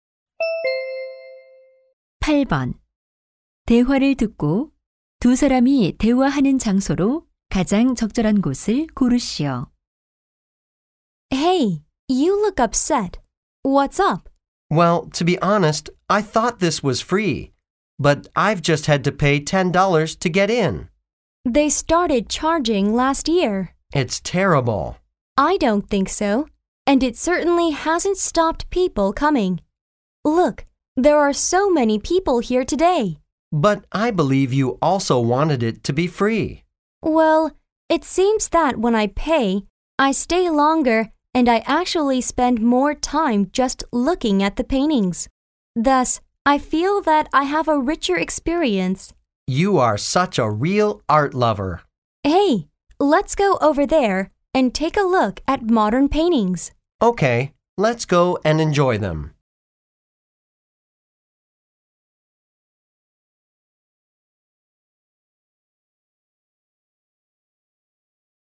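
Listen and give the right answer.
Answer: 미술관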